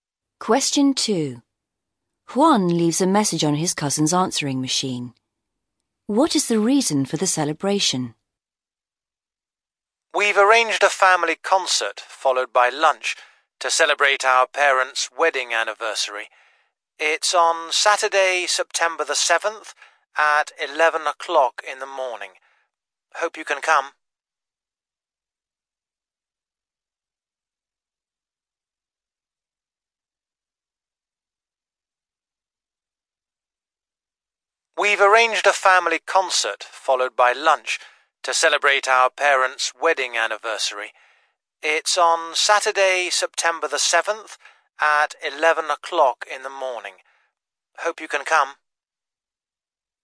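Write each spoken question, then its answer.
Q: What is the reason for the celebration?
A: Their parents' wedding anniversary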